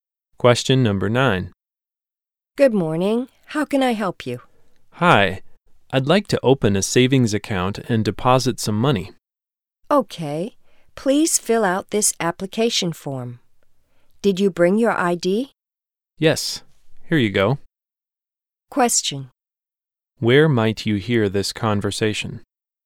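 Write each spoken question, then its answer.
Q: Where might you hear this conversation?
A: At a bank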